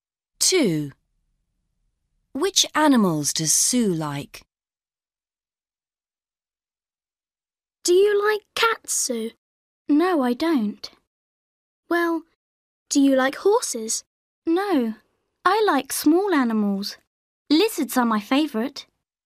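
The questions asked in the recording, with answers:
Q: Which animals does Sue like?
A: lizards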